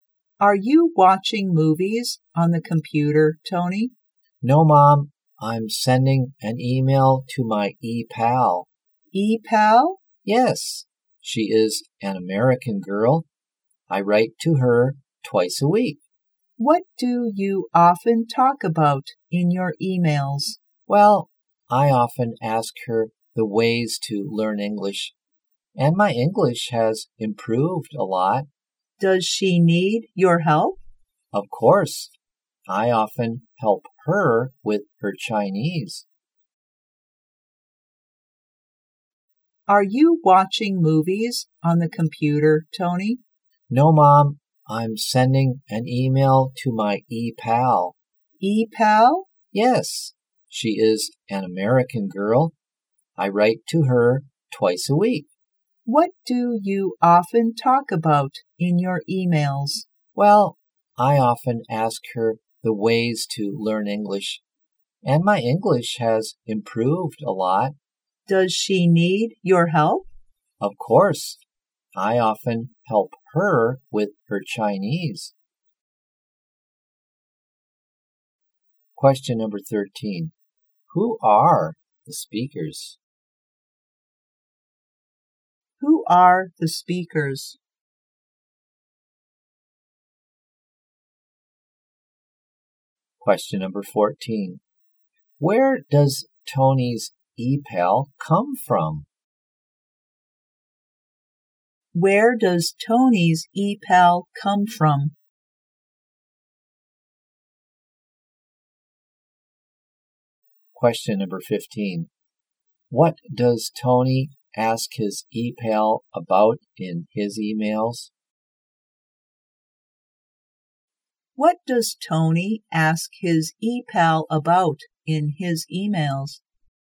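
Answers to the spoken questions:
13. Tony and his mom
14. America
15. The ways to learn English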